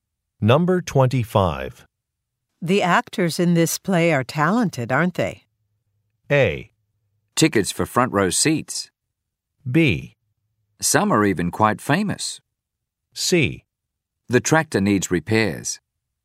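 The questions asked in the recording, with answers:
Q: The actors in this play are talented, aren't they?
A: B: Some are even quite famous.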